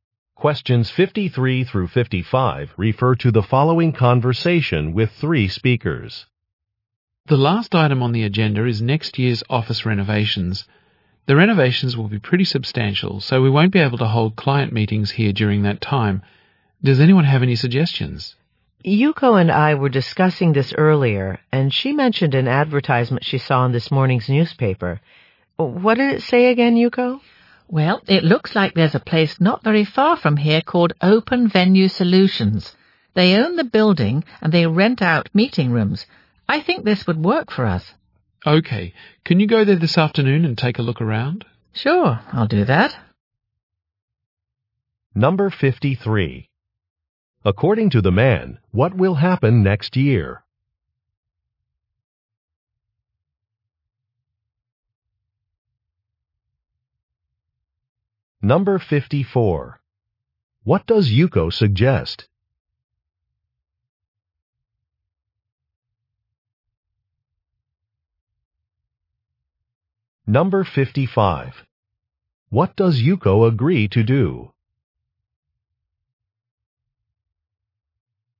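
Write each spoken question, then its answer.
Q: According to the man, what will happen next year?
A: The office will be renovated

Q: What does Yuko suggest?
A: Renting meeting rooms at Open Venue Solutions

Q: What does Yuko agree to do?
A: Visit the place this afternoon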